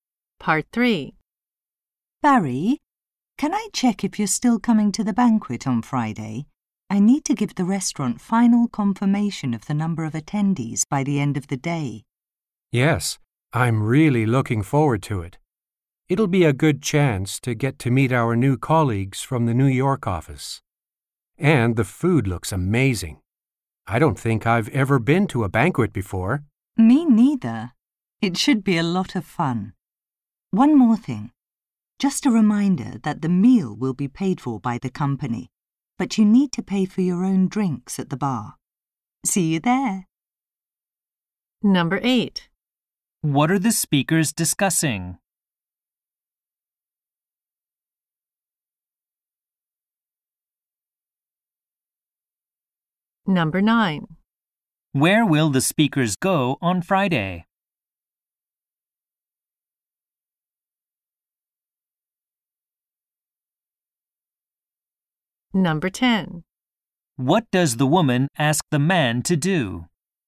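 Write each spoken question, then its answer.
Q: What are the speakers discussing?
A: A company banquet on Friday

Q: Where will the speakers go on Friday?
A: To a banquet at a restaurant

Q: What does the woman ask the man to do?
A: Confirm whether he is still coming to the banquet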